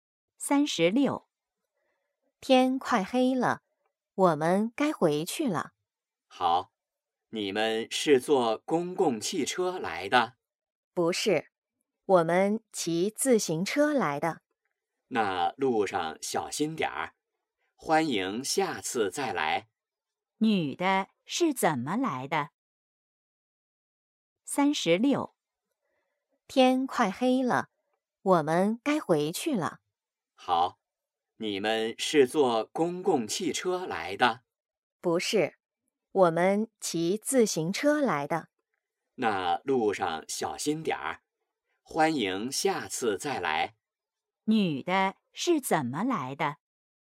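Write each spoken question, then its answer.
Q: 女的是怎么来的?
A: 骑自行车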